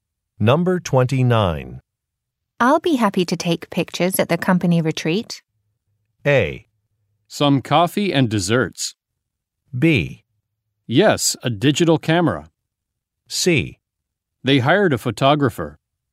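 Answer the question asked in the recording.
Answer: C: They hired a photographer.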